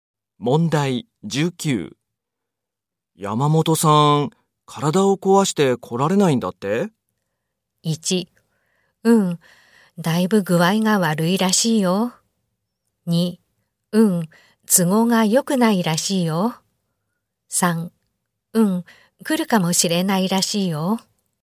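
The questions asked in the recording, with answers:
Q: 山本さん、体を壊して来られないんだって?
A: 1: うん、だいぶ具合が悪いらしいよ。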